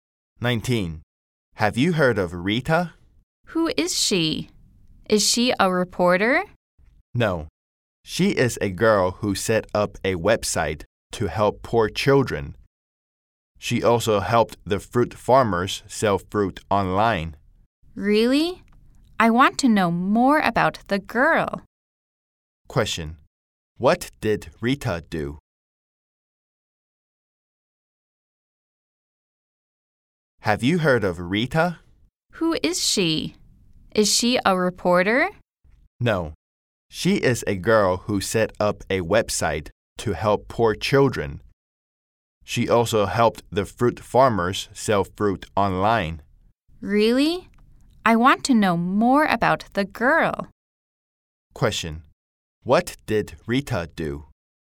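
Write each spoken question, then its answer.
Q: What did Rita do?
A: She set up a website to help poor children and helped fruit farmers sell fruit online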